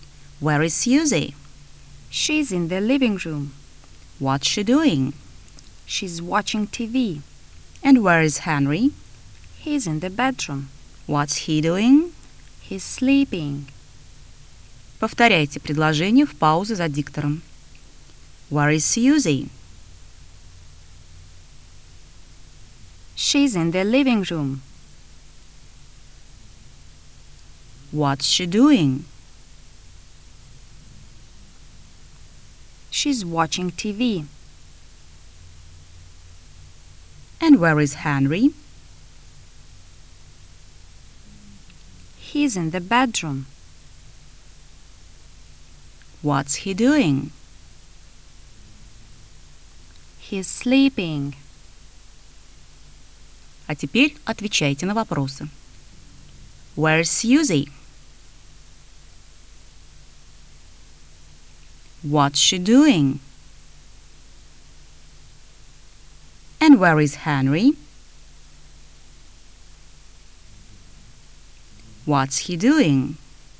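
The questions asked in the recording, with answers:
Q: Where's Susie?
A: She's in the living room.

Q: What's she doing?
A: She's watching TV.

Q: And where is Henry?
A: He's in the bedroom.

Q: What's he doing?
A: He's sleeping.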